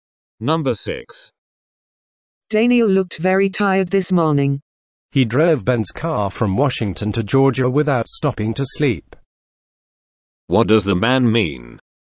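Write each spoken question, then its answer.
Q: What does the man mean?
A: Daniel drove all the way without sleeping, so he is tired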